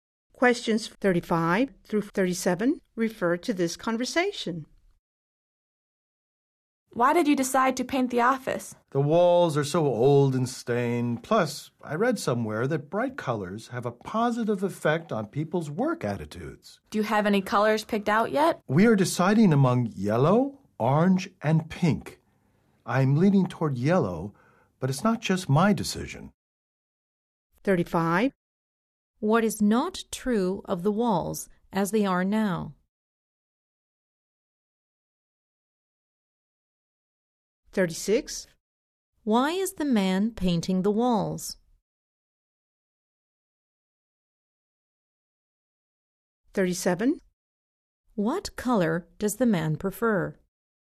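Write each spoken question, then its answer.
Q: Why is the man painting the walls?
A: Bright colors have a positive effect on work attitudes (and walls are old and stained)

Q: What color does the man prefer?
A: Yellow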